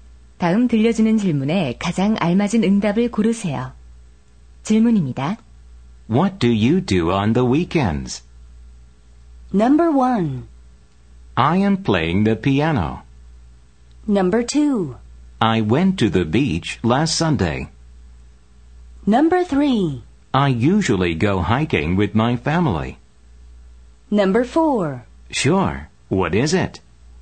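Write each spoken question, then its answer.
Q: What do you do on the weekends?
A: 3: I usually go hiking with my family.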